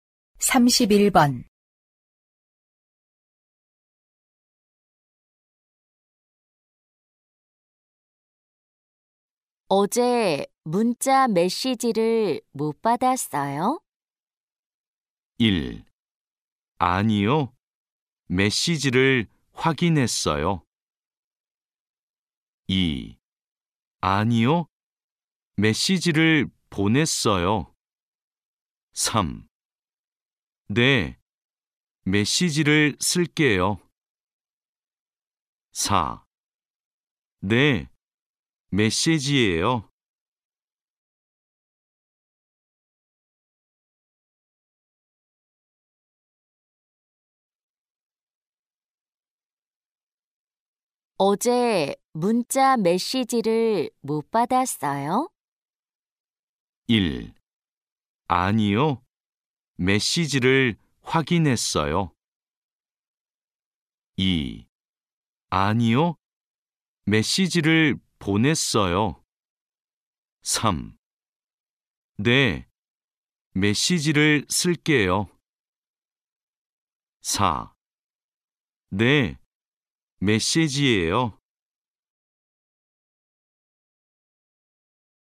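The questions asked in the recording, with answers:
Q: 어제 문자 메시지를 못 받았어요?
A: 1: 아니요. 메시지를 확인했어요.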